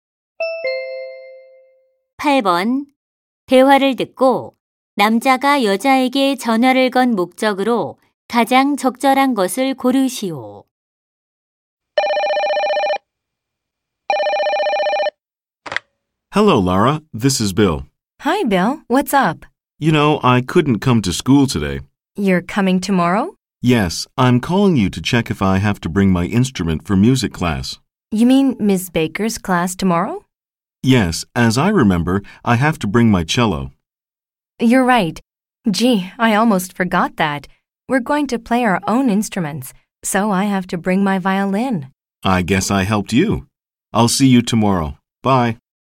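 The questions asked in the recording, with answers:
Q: 대화를 듣고 남자가 여자에게 전화를 건 목적으로 가장 적절한 것을 고르시오.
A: 음악 수업에 악기를 가져가야 하는지 확인하려고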